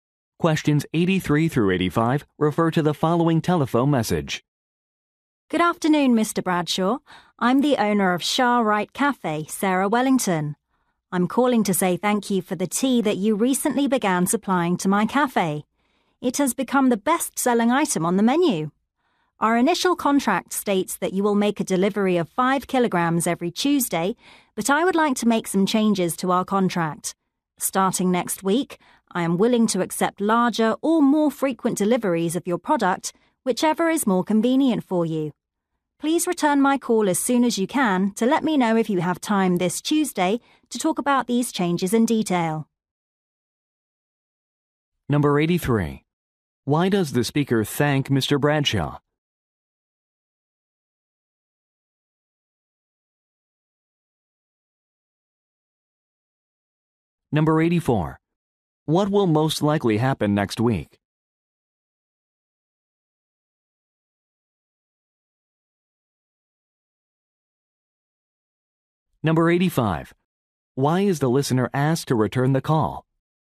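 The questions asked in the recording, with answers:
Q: Why does the speaker thank Mr.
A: For supplying tea that became the best-selling item

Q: What will most likely happen next week?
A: Larger or more frequent tea deliveries will start

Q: Why is the listener asked to return the call?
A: To say if he has time Tuesday to discuss contract changes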